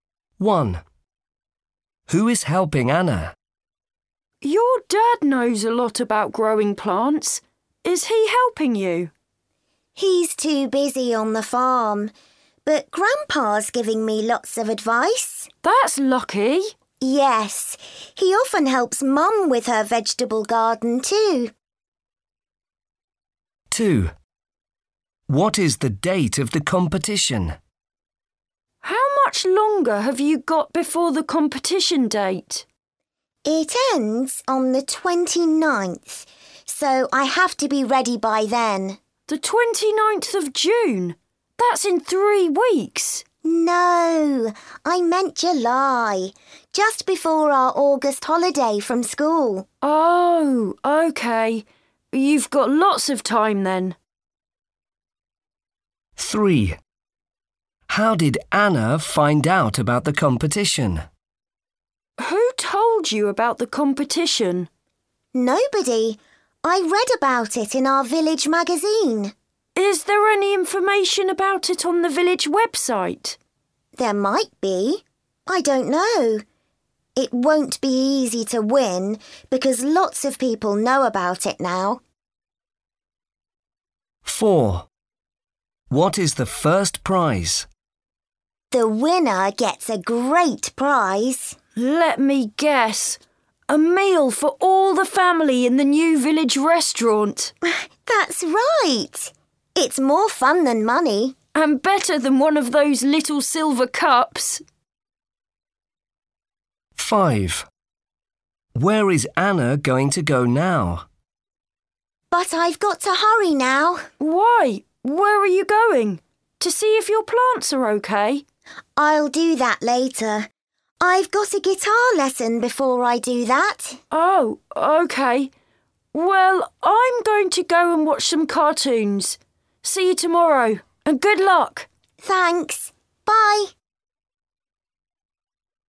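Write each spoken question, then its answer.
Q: Who is helping Anna?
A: Her grandpa

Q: What is the date of the competition?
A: 29th July

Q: How did Anna find out about the competition?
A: She read about it in the village magazine

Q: What is the first prize?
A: A family meal at the new village restaurant

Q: Where is Anna going to go now?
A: To a guitar lesson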